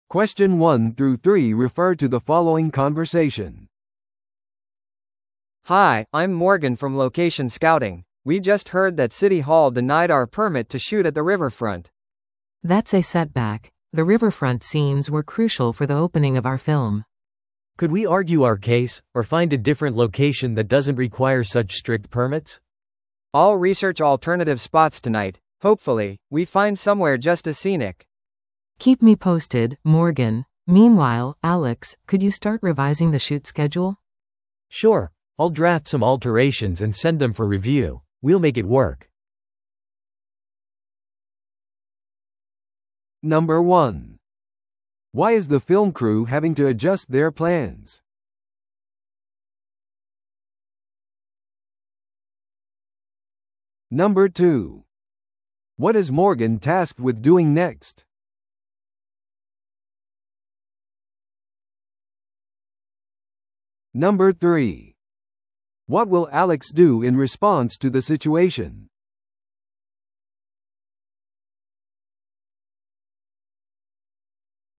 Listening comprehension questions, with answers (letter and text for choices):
Listen to the audio below and answer the questions.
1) Why is the film crew having to adjust their plans?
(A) 主演俳優が病気になった。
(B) 許可が下りなかった。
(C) 予算が削減された。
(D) 機材が紛失した。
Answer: (B) 許可が下りなかった。

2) What is Morgan tasked with doing next?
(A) 市役所との交渉。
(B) 代替ロケ地のスカウティング。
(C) 撮影全体のスケジュール変更。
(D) 新しい主演俳優を見つける。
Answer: (B) 代替ロケ地のスカウティング。

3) What will Alex do in response to the situation?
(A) 潜在的な法的行動を探る。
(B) 映画の投資家に報告する。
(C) 撮影スケジュールを見直す。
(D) プレスリリースを組織する。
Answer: (C) 撮影スケジュールを見直す。

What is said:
A: Hi, I'm Morgan from location scouting. We just heard that city hall denied our permit to shoot at the riverfront.
B: That's a setback. The riverfront scenes were crucial for the opening of our film.
C: Could we argue our case, or find a different location that doesn't require such strict permits?
A: I'll research alternative spots tonight. Hopefully, we find somewhere just as scenic.
B: Keep me posted, Morgan. Meanwhile, Alex, could you start revising the shoot schedule?
C: Sure, I'll draft some alterations and send them for review. We'll make it work.